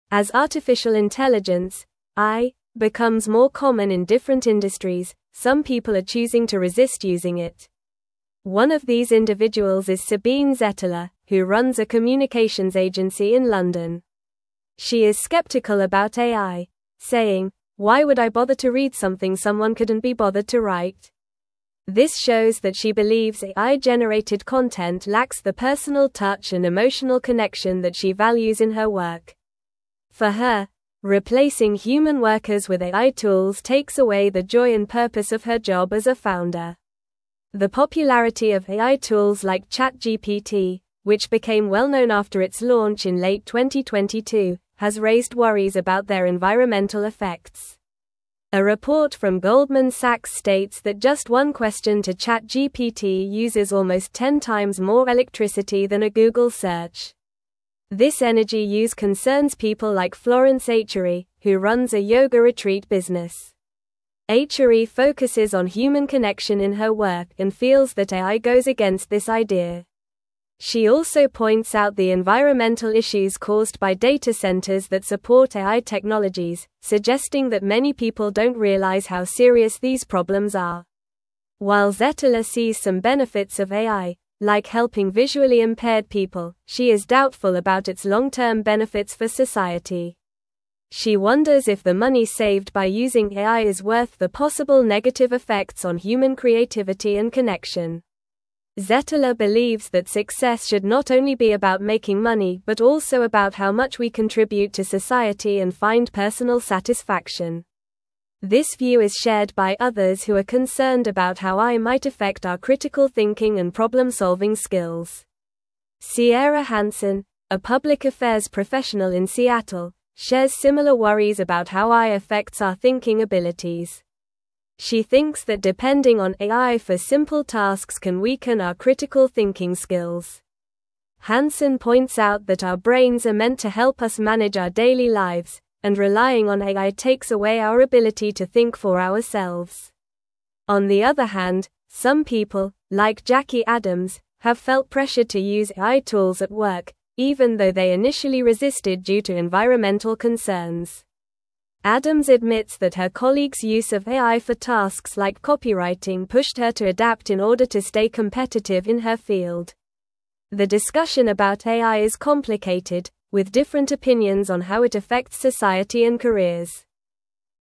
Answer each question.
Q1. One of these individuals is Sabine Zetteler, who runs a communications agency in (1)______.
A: London

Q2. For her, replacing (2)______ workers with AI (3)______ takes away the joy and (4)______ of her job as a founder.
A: human

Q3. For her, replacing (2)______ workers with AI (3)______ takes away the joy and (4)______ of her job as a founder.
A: tools

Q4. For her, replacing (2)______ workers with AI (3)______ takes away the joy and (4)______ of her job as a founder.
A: purpose

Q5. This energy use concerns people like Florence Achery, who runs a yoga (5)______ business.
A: retreat

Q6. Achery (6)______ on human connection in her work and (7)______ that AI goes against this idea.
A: focuses

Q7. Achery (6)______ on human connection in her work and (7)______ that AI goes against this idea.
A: feels

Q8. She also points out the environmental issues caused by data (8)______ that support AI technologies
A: centers

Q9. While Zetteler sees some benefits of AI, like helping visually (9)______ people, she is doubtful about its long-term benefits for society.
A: impaired

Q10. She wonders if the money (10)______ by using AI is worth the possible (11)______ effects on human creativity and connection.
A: saved

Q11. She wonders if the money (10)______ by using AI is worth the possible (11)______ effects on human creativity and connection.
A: negative

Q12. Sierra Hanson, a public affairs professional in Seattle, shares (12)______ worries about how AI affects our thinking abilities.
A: similar

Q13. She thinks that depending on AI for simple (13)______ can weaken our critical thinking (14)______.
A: tasks

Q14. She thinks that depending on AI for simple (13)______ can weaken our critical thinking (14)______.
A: skills

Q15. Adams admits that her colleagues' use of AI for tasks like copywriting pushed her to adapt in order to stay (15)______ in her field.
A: competitive

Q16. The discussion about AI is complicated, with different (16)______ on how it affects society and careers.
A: opinions

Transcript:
As artificial intelligence (AI) becomes more common in different industries, some people are choosing to resist using it. One of these individuals is Sabine Zetteler, who runs a communications agency in London. She is skeptical about AI, saying, "Why would I bother to read something someone couldn't be bothered to write?" This shows that she believes AI-generated content lacks the personal touch and emotional connection that she values in her work. For her, replacing human workers with AI tools takes away the joy and purpose of her job as a founder.
The popularity of AI tools like ChatGPT, which became well-known after its launch in late 2022, has raised worries about their environmental effects. A report from Goldman Sachs states that just one question to ChatGPT uses almost ten times more electricity than a Google search. This energy use concerns people like Florence Achery, who runs a yoga retreat business. Achery focuses on human connection in her work and feels that AI goes against this idea. She also points out the environmental issues caused by data centers that support AI technologies, suggesting that many people don't realize how serious these problems are.
While Zetteler sees some benefits of AI, like helping visually impaired people, she is doubtful about its long-term benefits for society. She wonders if the money saved by using AI is worth the possible negative effects on human creativity and connection. Zetteler believes that success should not only be about making money but also about how much we contribute to society and find personal satisfaction. This view is shared by others who are concerned about how AI might affect our critical thinking and problem-solving skills.
Sierra Hanson, a public affairs professional in Seattle, shares similar worries about how AI affects our thinking abilities. She thinks that depending on AI for simple tasks can weaken our critical thinking skills. Hanson points out that our brains are meant to help us manage our daily lives, and relying on AI takes away our ability to think for ourselves. On the other hand, some people, like Jackie Adams, have felt pressured to use AI tools at work, even though they initially resisted due to environmental concerns. Adams admits that her colleagues' use of AI for tasks like copywriting pushed her to adapt in order to stay competitive in her field. The discussion about AI is complicated, with different opinions on how it affects society and careers.

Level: Level 3